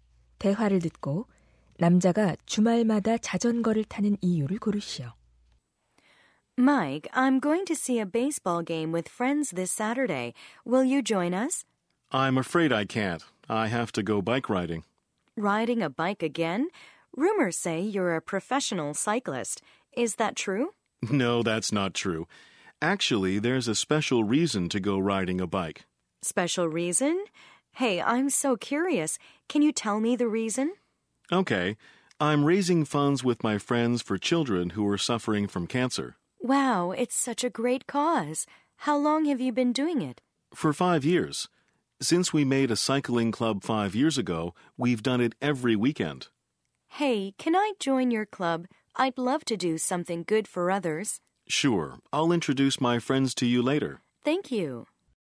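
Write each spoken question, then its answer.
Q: 대화를 듣고 남자가 주말마다 자전거를 타는 이유를 고르시오.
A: 암으로 고통받는 아이들을 위한 기금을 모으기 위해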